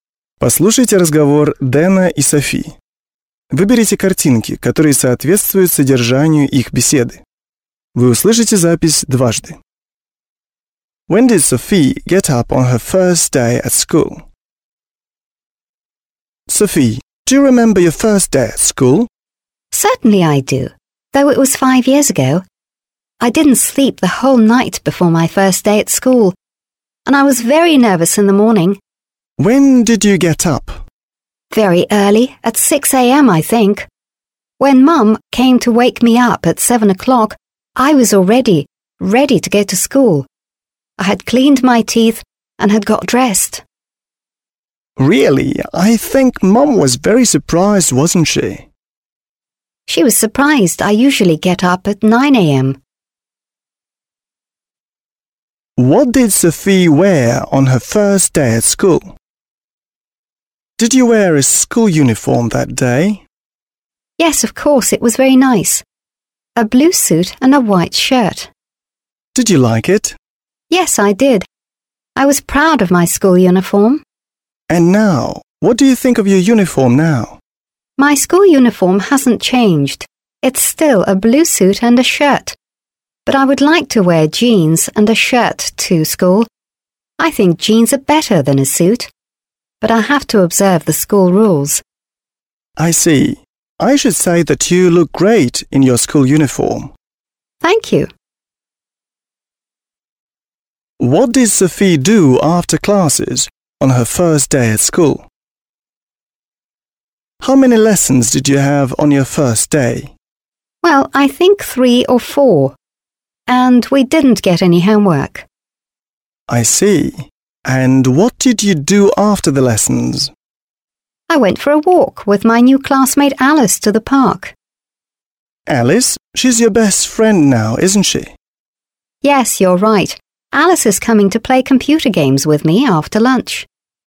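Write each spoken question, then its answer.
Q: When did Sophie get up on her first day at school?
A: At 6 a.m.

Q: What did Sophie wear on her first day at school?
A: A blue suit and a white shirt (school uniform)

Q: What did Sophie do after classes on her first day at school?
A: She went for a walk to the park with her new classmate Alice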